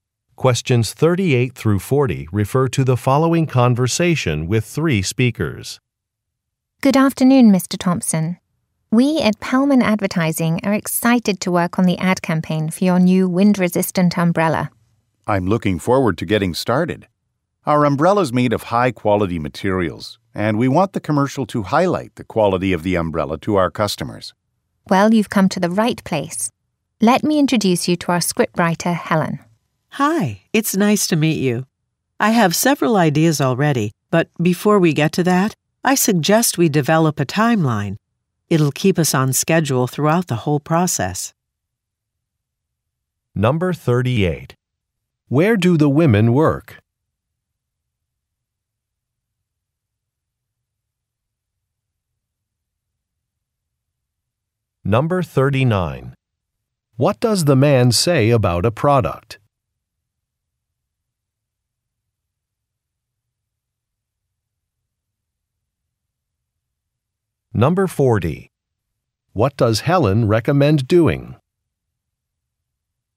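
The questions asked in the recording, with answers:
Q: Where do the women work?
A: At an advertising agency

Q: What does the man say about a product?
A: It is made of high-quality materials

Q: What does Helen recommend doing?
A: Developing a timeline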